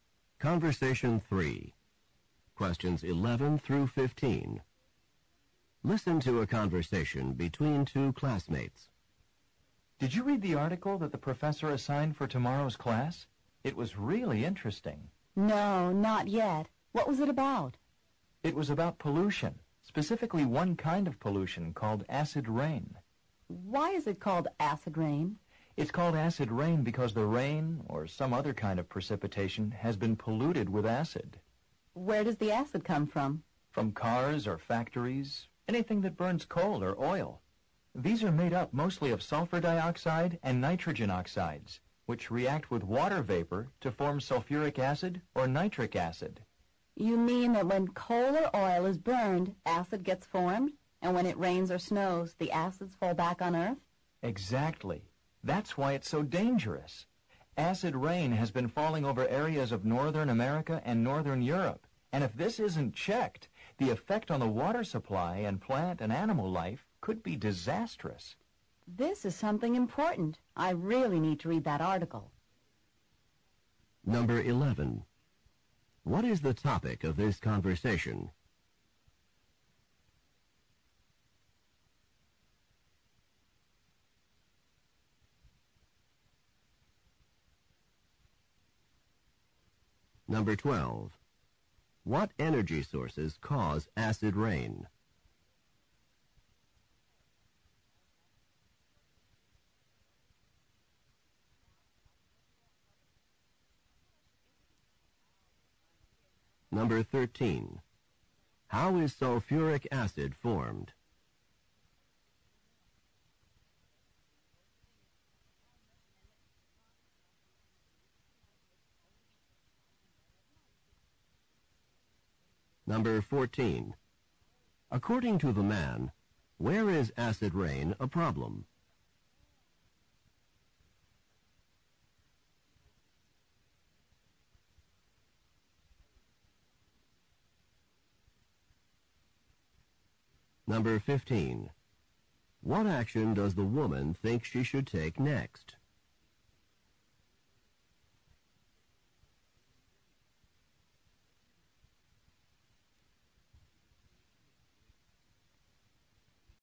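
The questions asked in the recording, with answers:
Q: What is the topic of this conversation?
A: Acid rain

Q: What energy sources cause acid rain?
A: Coal and oil

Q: How is sulfuric acid formed?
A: Sulfur dioxide reacts with water vapor

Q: According to the man, where is acid rain a problem?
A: Northern America and Northern Europe

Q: What action does the woman think she should take next?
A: Read the article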